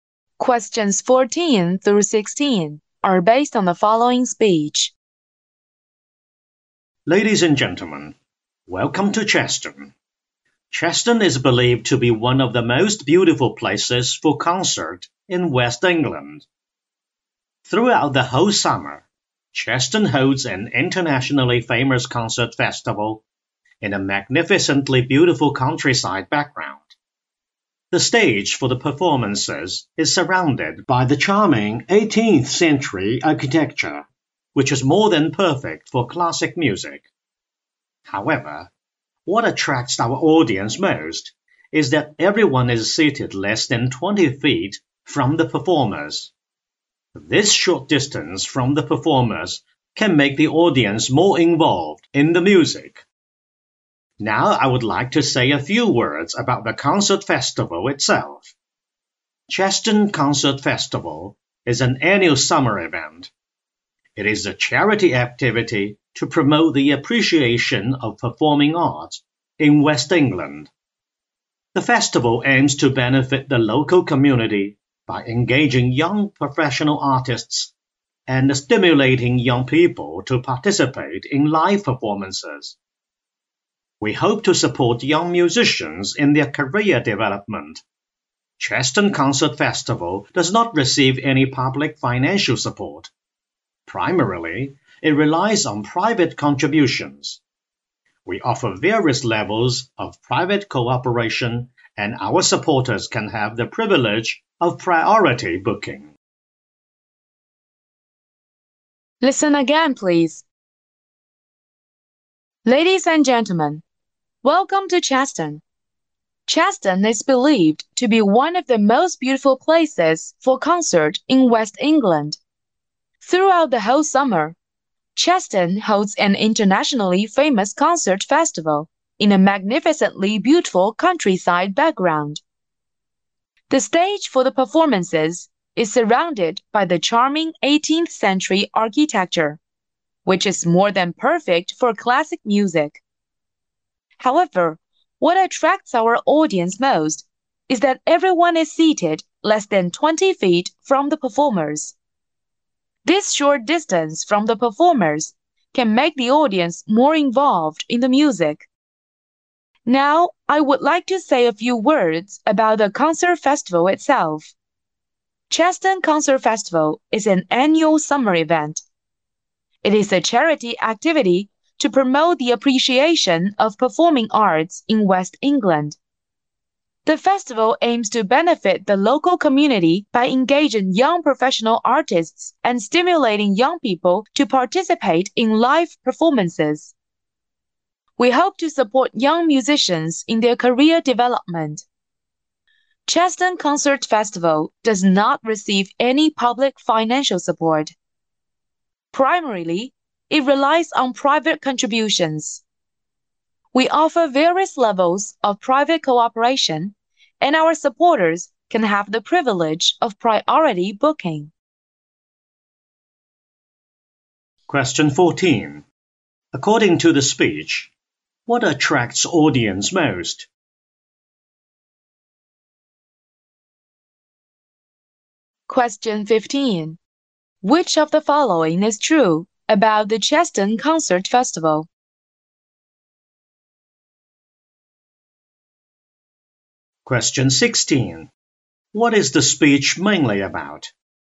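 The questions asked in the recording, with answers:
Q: According to the speech, what attracts audience most?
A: Being seated less than 20 feet from the performers

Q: What is the speech mainly about?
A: An introduction to the Cheston Concert Festival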